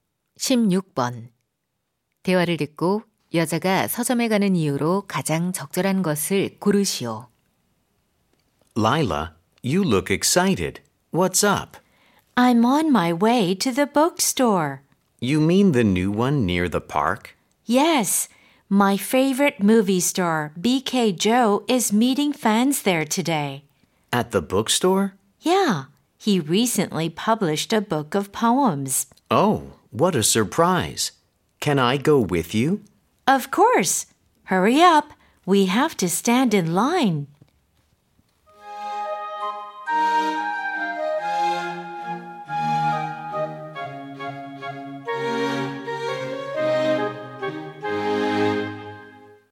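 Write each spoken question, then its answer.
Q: 대화를 듣고 여자가 서점에 가는 이유로 가장 적절한 것을 고르시오.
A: 좋아하는 영화배우를 만나기 위해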